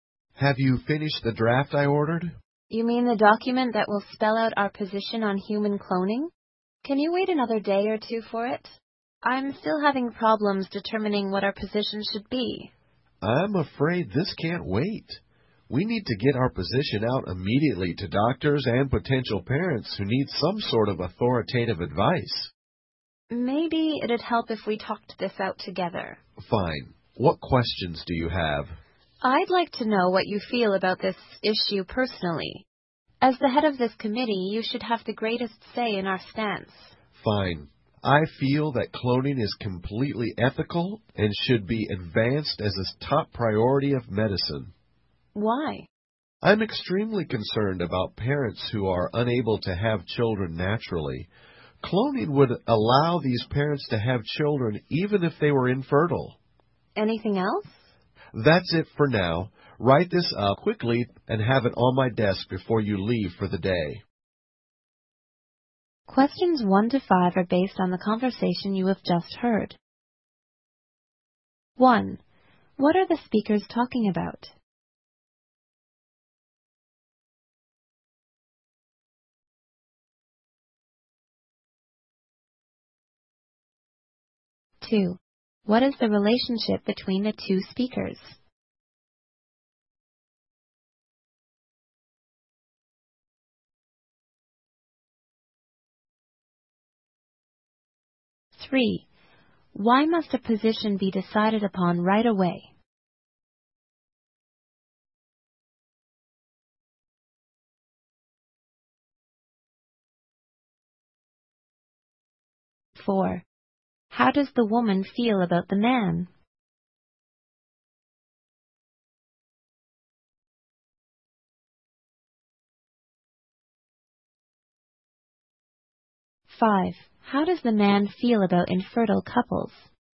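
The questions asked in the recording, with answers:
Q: What are the speakers talking about?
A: Their position on human cloning

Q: Why must a position be decided upon right away?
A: Doctors and potential parents need authoritative advice immediately.

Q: How does the man feel about infertile couples?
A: He is extremely concerned about them.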